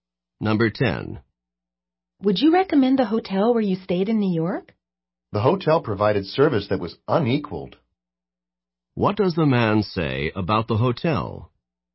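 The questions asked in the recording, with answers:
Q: What does the man say about the hotel?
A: Its service was excellent, better than any other.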